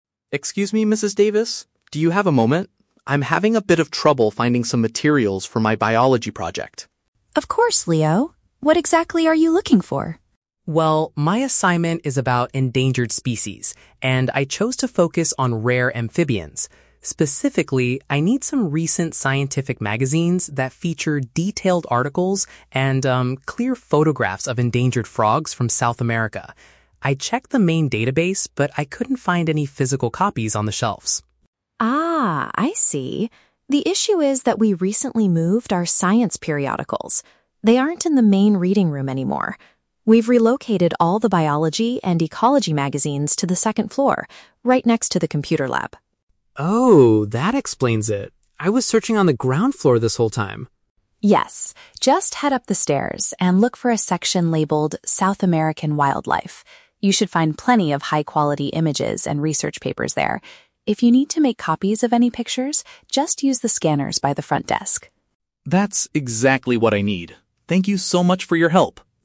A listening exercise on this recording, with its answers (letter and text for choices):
Listen to a conversation between a student and a librarian. Choose the best answer (A, B, or C) for each question.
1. What is the student primarily trying to find for his project?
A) Heavy textbooks about general wildlife in South America.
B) Science publications containing images of specific frogs.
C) A short documentary film about endangered amphibians.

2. Why was the student unable to find the materials at first?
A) Another biology student had already borrowed all of them.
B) He did not know how to search the library's main database.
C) The library had recently changed the location of those items.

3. What does the librarian tell the student to do if he needs copies of the images?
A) Use the scanning equipment located near the desk.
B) Ask the staff in the computer lab to print them out.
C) Take the magazines home to take pictures of them.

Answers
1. B) Science publications containing images of specific frogs.
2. C) The library had recently changed the location of those items.
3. A) Use the scanning equipment located near the desk.

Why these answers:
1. The student says he needs "scientific magazines" with "clear photographs" of "endangered frogs." Option B uses synonyms: "science publications" (magazines) and "images" (photographs).
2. The librarian explains that they "recently moved our science periodicals" and "relocated" them to the second floor. Option C paraphrases this as changing the "location of those items."
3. The librarian advises the student to "use the scanners by the front desk" if he needs to make copies. Option A is a direct paraphrase of this instruction.

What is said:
Student: Excuse me, Mrs. Davis? Do you have a moment? I'm having a bit of trouble finding some materials for my biology project.
Librarian: Of course, Leo. What exactly are you looking for?
Student: Well, my assignment is about endangered species, and I chose to focus on rare amphibians. Specifically, I need some recent scientific magazines that feature detailed articles and, um, clear photographs of endangered frogs from South America. I checked the main database, but I couldn't find any physical copies on the shelves.
Librarian: Ah, I see. The issue is that we recently moved our science periodicals. They aren't in the main reading room anymore. We've relocated all the biology and ecology magazines to the second floor, right next to the computer lab.
Student: Oh, that explains it! I was searching on the ground floor this whole time.
Librarian: Yes, just head up the stairs, and look for a section labeled "South American Wildlife." You should find plenty of high-quality images and research papers there. If you need to make copies of any pictures, just use the scanners by the front desk.
Student: That's exactly what I need. Thank you so much for your help!